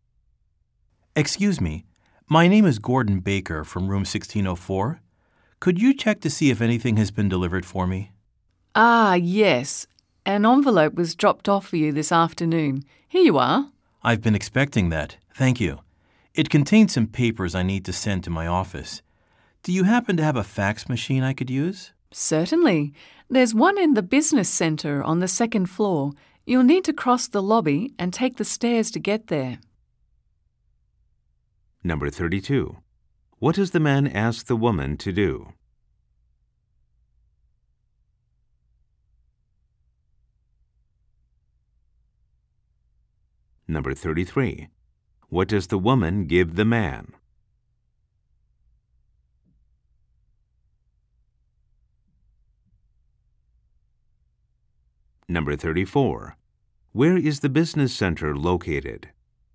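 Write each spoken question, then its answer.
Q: What does the man ask the woman to do?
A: Check whether anything was delivered for him

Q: What does the woman give the man?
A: An envelope

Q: Where is the business center located?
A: On the second floor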